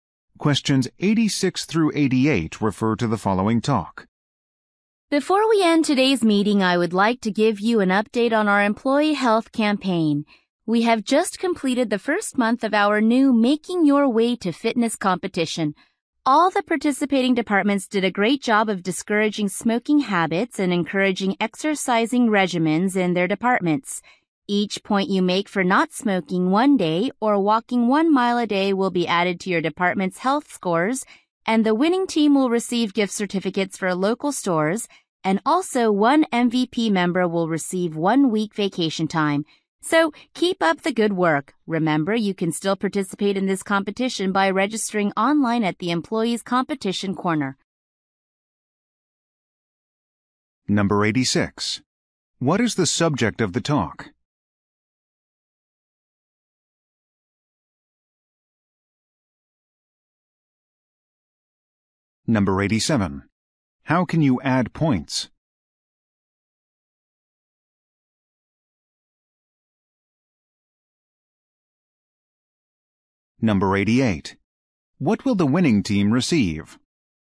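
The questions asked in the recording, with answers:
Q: What is the subject of the talk?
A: The employee health campaign (fitness competition)

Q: How can you add points?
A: By not smoking for a day or walking 1 mile a day

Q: What will the winning team receive?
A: Gift certificates for local stores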